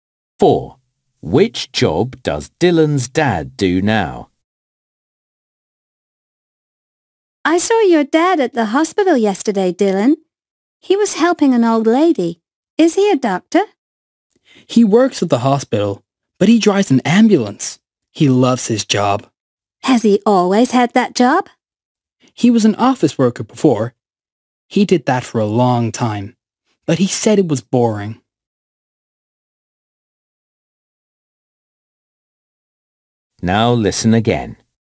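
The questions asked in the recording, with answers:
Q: Which job does Dylan's dad do now?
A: He drives an ambulance.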